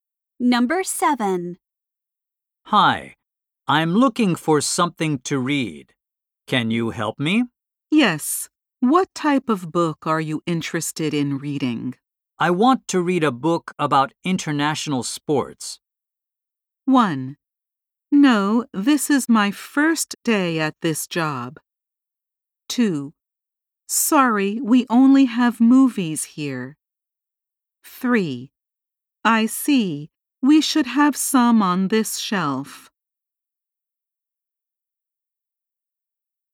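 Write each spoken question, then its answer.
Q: I want to read a book about international sports.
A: 3: I see. We should have some on this shelf.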